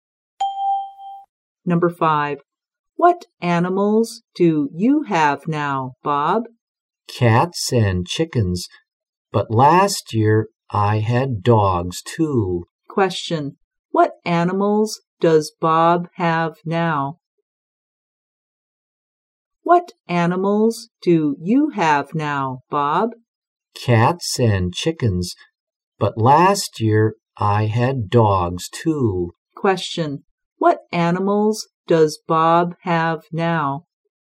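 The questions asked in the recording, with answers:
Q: What animals does Bob have now?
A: Cats and chickens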